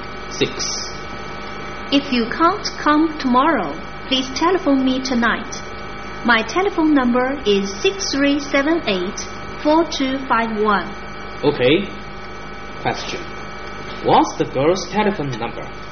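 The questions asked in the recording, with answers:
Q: What's the girl's telephone number?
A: 6378-4251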